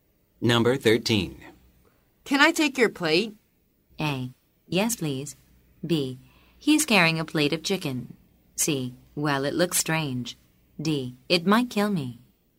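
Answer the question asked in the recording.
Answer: A: Yes, please.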